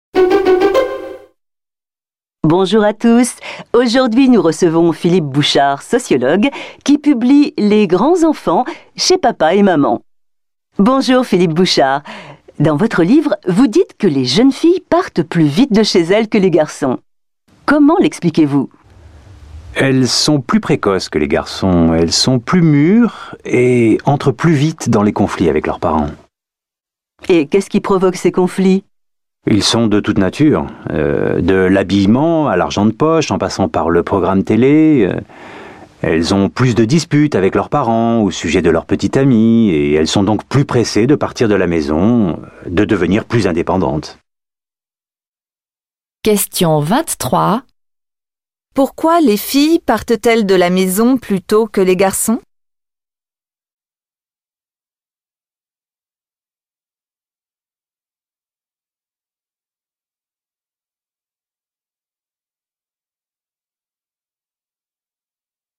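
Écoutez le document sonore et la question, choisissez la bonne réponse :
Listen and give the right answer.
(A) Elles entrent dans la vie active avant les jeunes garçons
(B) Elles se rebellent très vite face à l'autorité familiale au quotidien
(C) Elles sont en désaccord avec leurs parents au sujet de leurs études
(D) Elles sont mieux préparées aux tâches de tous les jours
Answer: (B) Elles se rebellent très vite face à l'autorité familiale au quotidien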